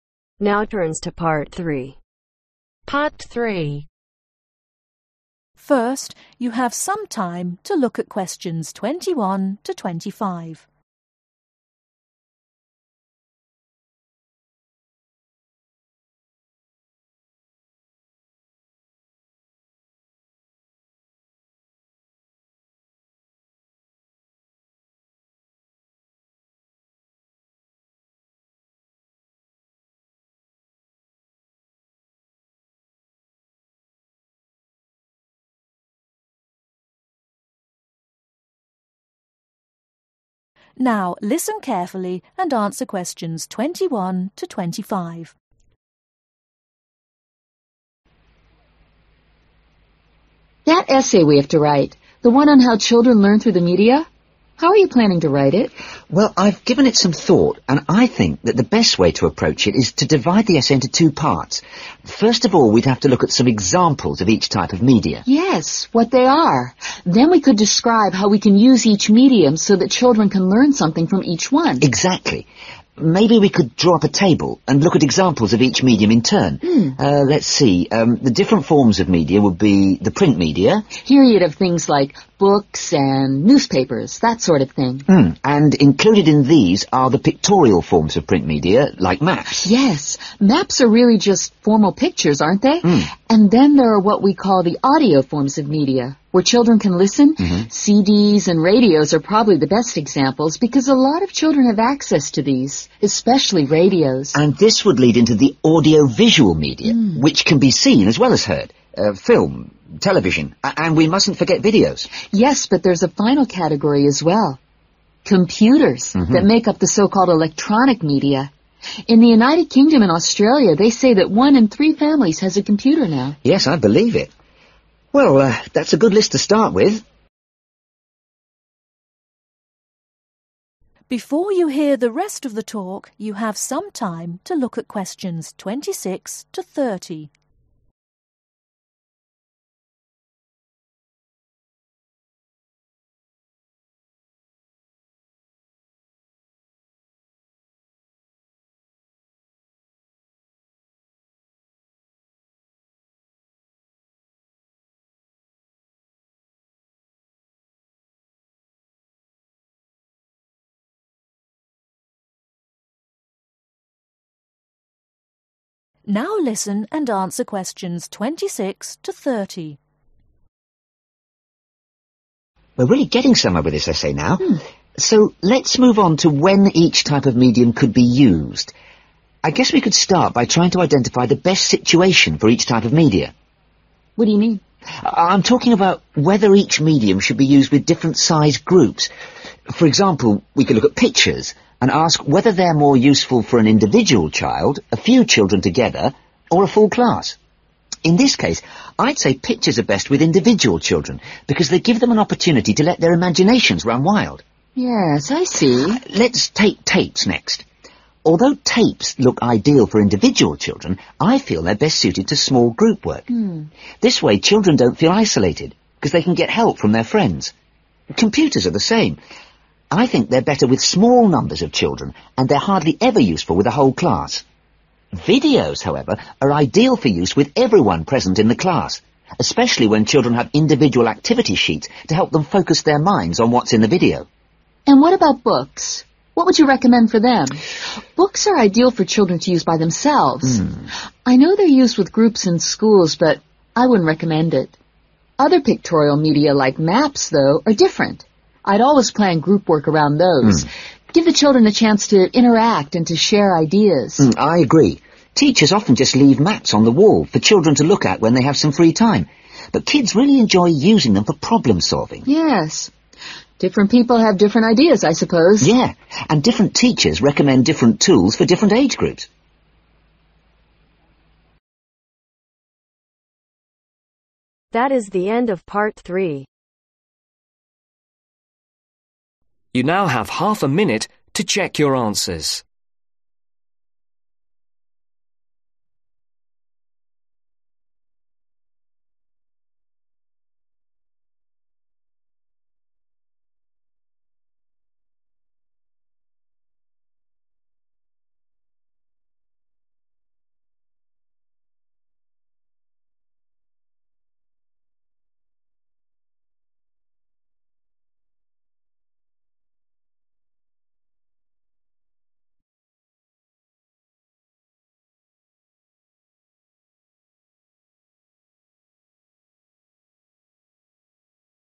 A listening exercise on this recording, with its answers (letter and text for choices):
Complete the table below. Write ONE WORD ONLY for each answer.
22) Pictures (22)............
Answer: Map (s)

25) Electronic (25)............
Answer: Computer (s)

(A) individual children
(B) five or six children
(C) whole class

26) Tapes ............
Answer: (B) five or six children

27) Computer ............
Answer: (B) five or six children

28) Videos ............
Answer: (C) whole class

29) Books ............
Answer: (A) individual children

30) Wall maps ............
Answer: (B) five or six children